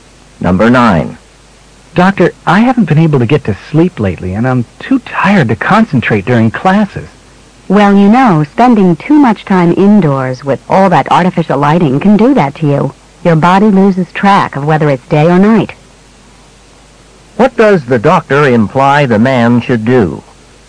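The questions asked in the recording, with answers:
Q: What does the doctor imply the man should do?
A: Spend more time outdoors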